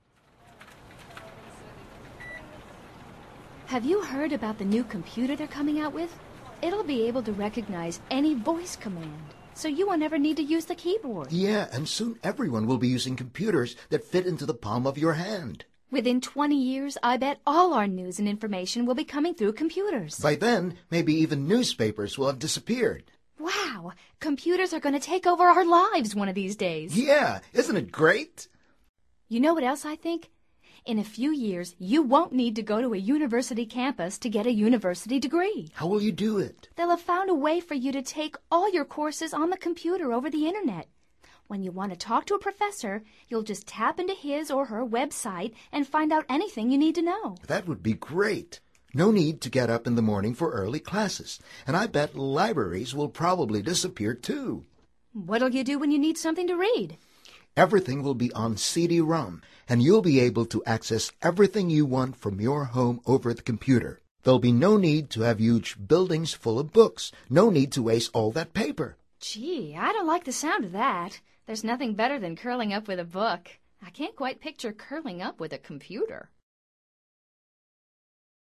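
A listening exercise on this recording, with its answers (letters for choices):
Activity 118: Basándote en los comentarios anteriores, selecciona las opciones más adecuadas para cada oración. Verifica luego las respuestas correctas.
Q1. Reyna and Jimmy are talking about ...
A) a new highly advanced computer.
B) a laptop coming out in the future.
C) a highly advanced notebook.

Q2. Jimmy says that future computers ...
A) will be able to recognize voice.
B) will fit into the palm of your hand.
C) will display news and information.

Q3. Reyna thinks that ...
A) everything will be accessed from home.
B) libraries will probably disappear.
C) people won't need to go to universities.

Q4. What would Reyna probably miss?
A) Reading a book online.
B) Curling up with a book.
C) Curling up with a computer.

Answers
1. A
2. B
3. C
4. B

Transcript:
Have you heard about the new computer they're coming out with? 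It'll be able to recognize any voice command, so you won't ever need to use the keyboard.
Yeah, and soon everyone will be using computers that fit into the palm of your hand.
Within 20 years, I bet all our news and information will be coming through computers.
By then, maybe even newspapers will have disappeared!
Wow! Computers are going to take over our lives one of these days.
Yeah! Isn't it great!
You know what else I think? In a few years, you won't need to go to a university campus to get a university degree.
How will you do it?
They'll have found a way for you to take all your courses on the computer over the Internet. When you want to talk to a professor, you'll just tap into his or her web site and find out anything you need to know.
That would be great. No need to get up in the morning for early classes! And I bet libraries will probably disappear, too.
What'll you do when you need something to read?
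Everything will be on CD-ROM, and you'll be able to access everything you want from your home over the computer. There will be no need to have huge buildings full of books. No need to waste all that paper.
Gee, I don't like the sound of that. There's nothing better than curling up with a book. I can't quite picture "curling up" with a computer!

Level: Nivel Avanzado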